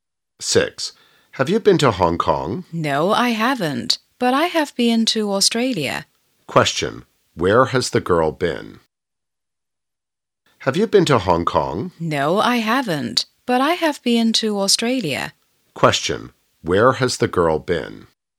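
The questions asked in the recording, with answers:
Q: Where has the girl been?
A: Australia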